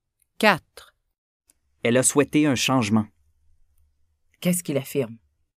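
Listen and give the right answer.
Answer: Il affirme qu'elle a souhaité un changement.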